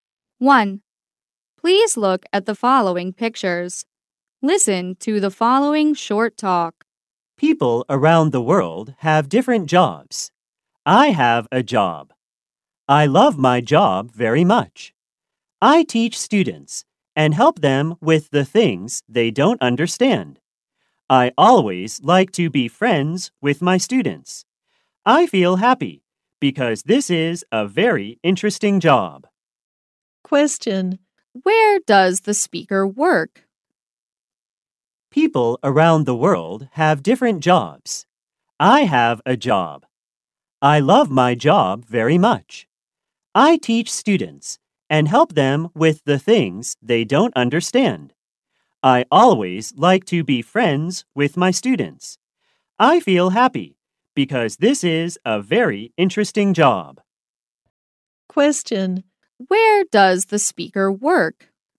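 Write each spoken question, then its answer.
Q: Where does the speaker work?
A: At a school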